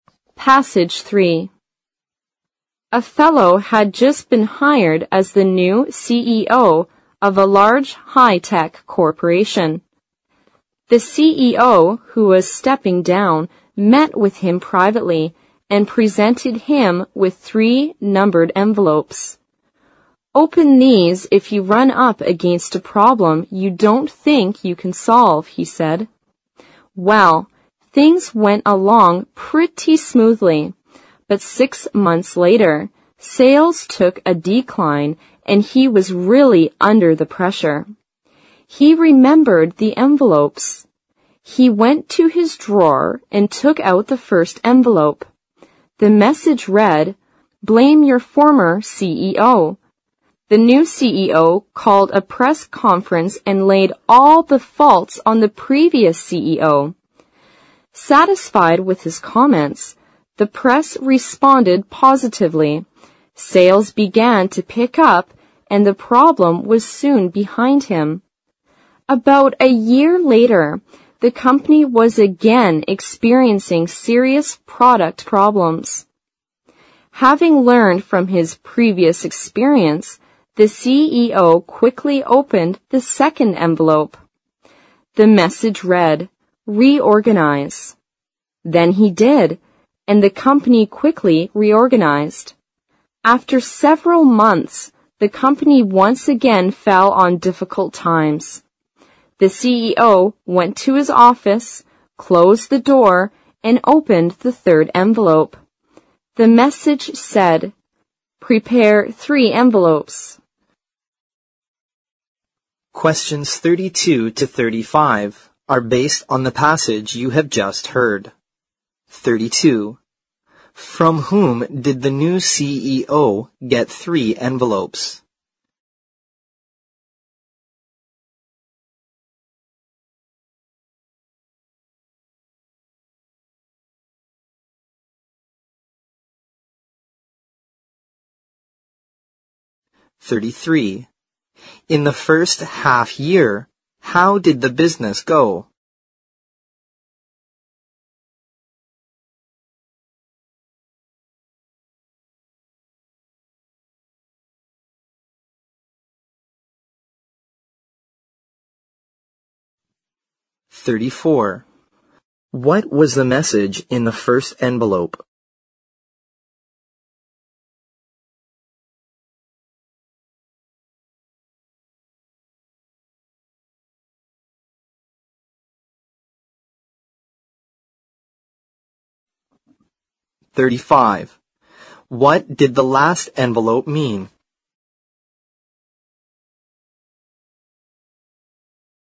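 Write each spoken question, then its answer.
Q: From whom did the new CEO get 3 envelopes?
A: From the CEO who was stepping down (the former CEO)

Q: In the first half year, how did the business go?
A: Smoothly at first, but sales declined after six months

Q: What was the message in the first envelope?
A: Blame your former CEO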